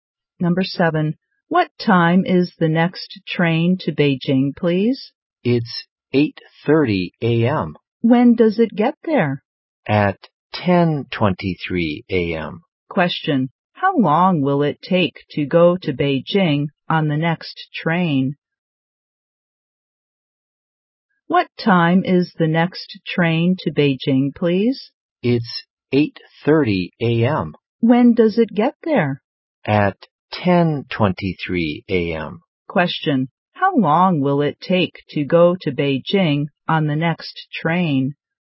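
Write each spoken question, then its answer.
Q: How long will it take to go to Beijing on the next train?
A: 1 hour and 53 minutes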